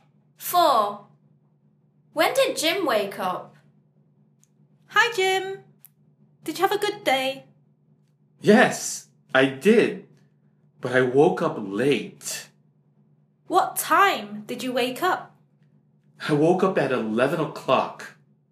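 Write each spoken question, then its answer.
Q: When did Jim wake up?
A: at 11 o'clock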